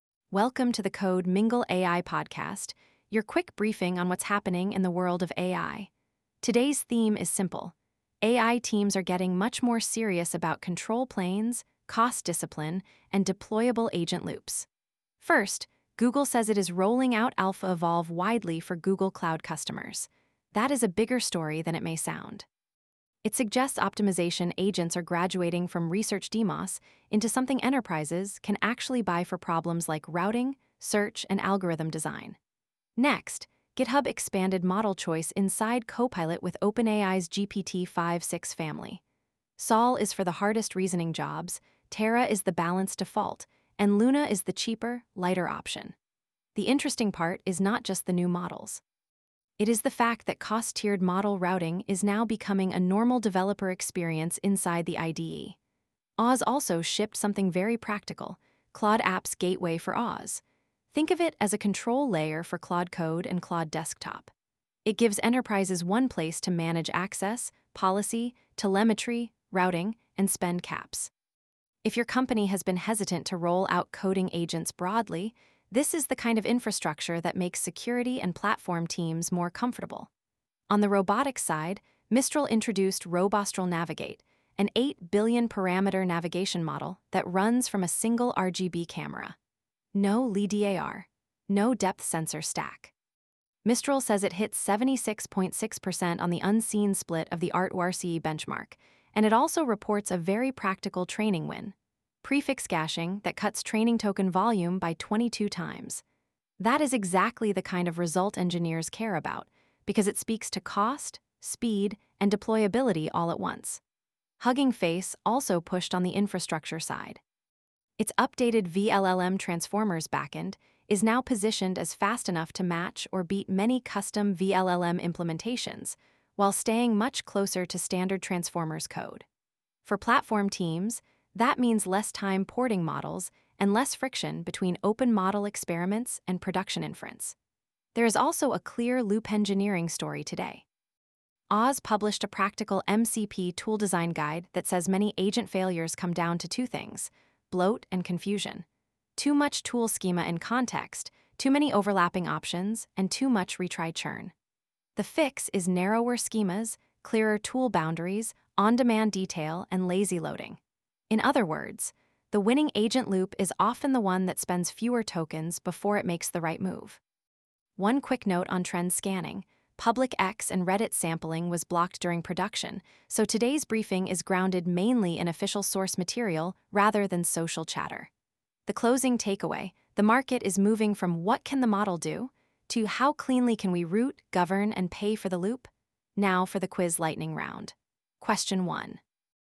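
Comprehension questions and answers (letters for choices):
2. According to AWS's new MCP tool design guidance, what are the two main causes of many agent tool failures?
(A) Latency and bandwidth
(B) Bloat and confusion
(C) GPU shortages and cold starts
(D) Prompt length and image quality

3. What is the most important hardware simplification in Mistral's Robostral Navigate system?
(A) It runs only on custom ASICs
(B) It replaces all cameras with radar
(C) It navigates with a single RGB camera instead of LiDAR, depth sensors, or multi-camera stacks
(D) It requires a fixed map of every building in advance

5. What is the practical advantage of Hugging Face's updated vLLM transformers backend?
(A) It removes the need for any GPUs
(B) It makes custom serving ports unnecessary for many models while preserving high performance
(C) It forces all inference onto Hugging Face-hosted endpoints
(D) It is only useful for image models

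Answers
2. B
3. C
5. B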